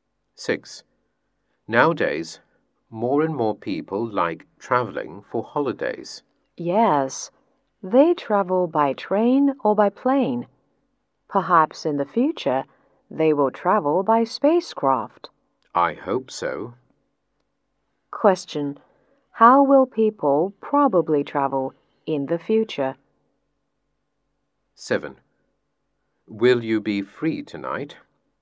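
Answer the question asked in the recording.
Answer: By spacecraft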